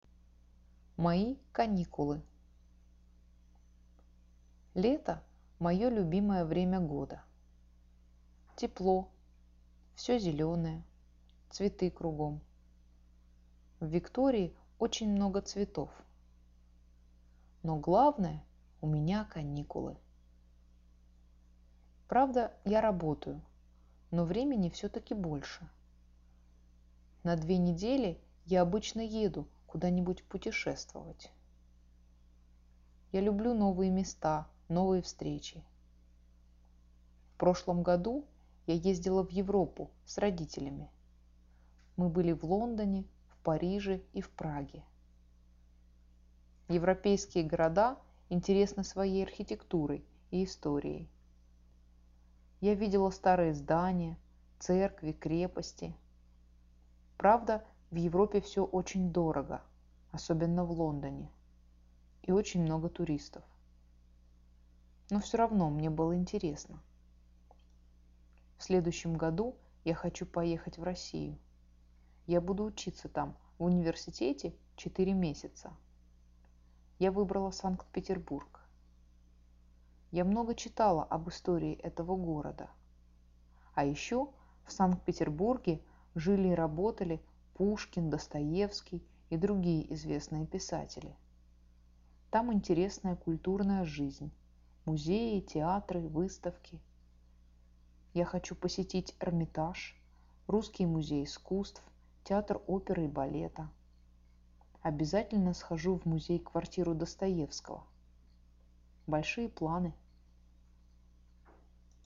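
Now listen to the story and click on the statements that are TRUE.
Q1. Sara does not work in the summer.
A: False

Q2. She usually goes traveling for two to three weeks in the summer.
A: False

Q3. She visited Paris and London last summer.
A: True

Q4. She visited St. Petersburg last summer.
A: False

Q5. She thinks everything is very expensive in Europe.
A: True

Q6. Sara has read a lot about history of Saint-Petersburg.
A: True

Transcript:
Но главное - у меня каникулы!
Правда, я работаю, но времени всё-таки больше.
На две недели я обычно еду куда-нибудь путешествовать.
Я люблю новые места, новые встречи.
В прошлом году я ездила в Европу с родителями.
Мы были в Лондоне, в Париже и в Праге.
Европейские города интересны своей архитектурой и историей.
Я видела старые здания, церкви, крепости.
Правда, в Европе всё очень дорого – особенно в Лондоне.
И очень много туристов.
Но всё равно мне было интересно.
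В следующем году я хочу поехать в Россию.
Я буду учиться там в университете четыре месяца.
Я выбрала Санкт-Петербург.
Я много читала об истории этого города.
А ещё в Санкт-Петербурге жили и работали Пушкин, Достоевский, и другие известные писатели.
Там интересная культурная жизнь: музеи, театры, выставки.
Я хочу посетить Эрмитаж, Русский музей искусств, театр оперы и балета.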